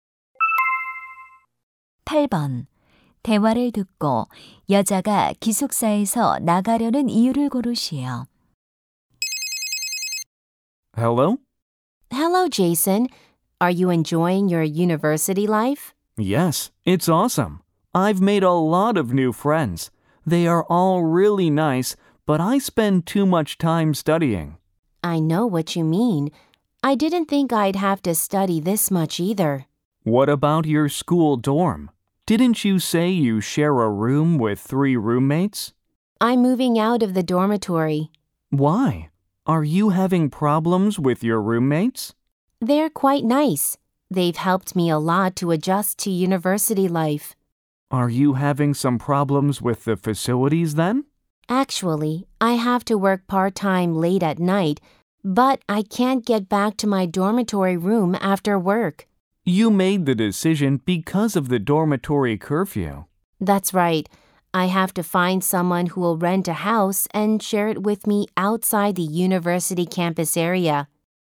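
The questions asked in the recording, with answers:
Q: 대화를 듣고 여자가 기숙사에서 나가려는 이유를 고르시오.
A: 아르바이트 때문에 기숙사 통금 시간을 지킬 수 없어서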